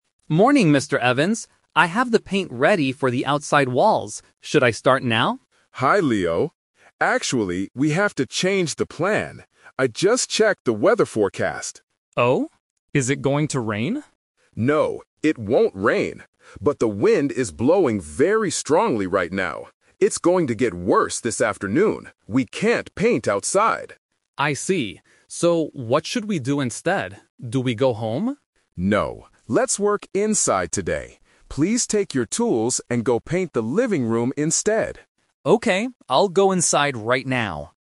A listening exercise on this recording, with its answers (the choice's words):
Listen to the conversation and choose the correct answer (A, B, or C).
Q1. What did Leo initially plan to do today?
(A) Paint the living room.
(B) Paint the outside walls.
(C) Buy more paint.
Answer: Paint the outside walls.

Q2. Why do they have to change their plan?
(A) Because it is going to rain.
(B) Because the manager is sick.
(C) Because the wind is very strong.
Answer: Because the wind is very strong.

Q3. What will Leo do next?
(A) He will go home.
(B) He will work inside the house.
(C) He will wait for the weather to get better.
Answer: He will work inside the house.

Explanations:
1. Leo asks at the beginning, "I have the paint ready for the outside walls. Should I start now?" Option (A) is the trap because painting the living room is their new plan, not the initial one. Option (C) is never mentioned.
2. The manager says, "the wind is blowing very strongly right now... We can't paint outside." Option (A) is a trap; Leo asks if it is going to rain, but the manager explicitly says, "No, it won't rain." Option (B) is not mentioned.
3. The manager tells Leo, "let's work inside today... go paint the living room instead," and Leo agrees. Option (A) is the trap because Leo asks, "Do we go home?" but the manager says "No." Option (C) is plausible but not part of their discussion.

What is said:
Leo: Morning, Mr. Evans. I have the paint ready for the outside walls. Should I start now?
Manager: Hi, Leo. Actually, we have to change the plan. I just checked the weather forecast.
Leo: Oh? Is it going to rain?
Manager: No, it won't rain. But the wind is blowing very strongly right now. It's going to get worse this afternoon. We can't paint outside.
Leo: I see. So, what should we do instead? Do we go home?
Manager: No, let's work inside today. Please take your tools and go paint the living room instead.